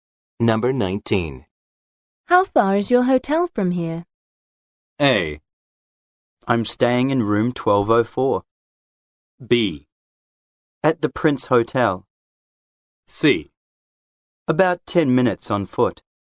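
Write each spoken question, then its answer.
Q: How far is your hotel from here?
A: C: About 10 minutes on foot.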